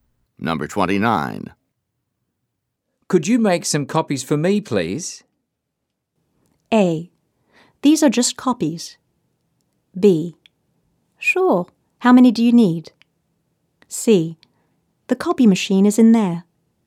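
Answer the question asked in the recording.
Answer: B: Sure. How many do you need?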